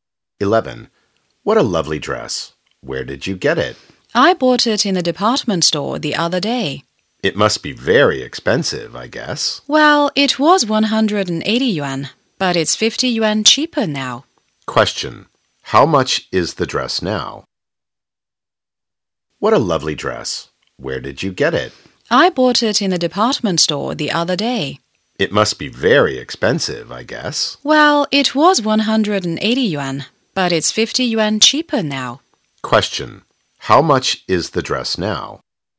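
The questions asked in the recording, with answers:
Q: How much is the dress now?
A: 130 yuan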